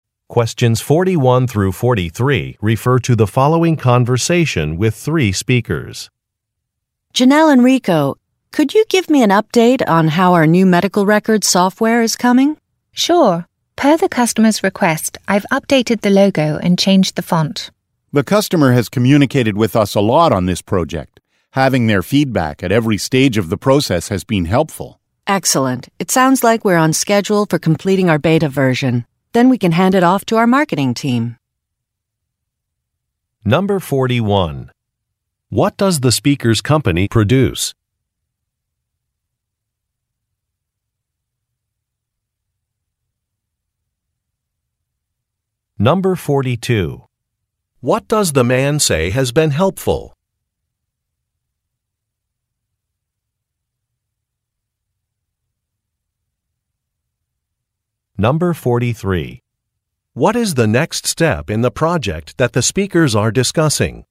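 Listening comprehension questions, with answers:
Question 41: What does the speakers' company produce?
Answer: Software

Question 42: What does the man say has been helpful?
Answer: Customer feedback

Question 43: What is the next step in the project that the speakers are discussing?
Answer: Sending a product to another group in the company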